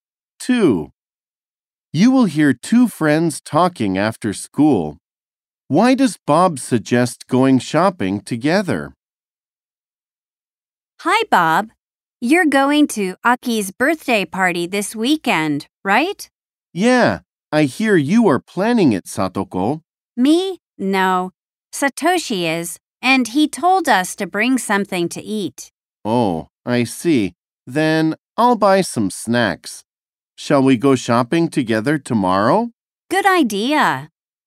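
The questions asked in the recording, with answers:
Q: Why does Bob suggest going shopping together?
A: To buy snacks to bring to Aki's birthday party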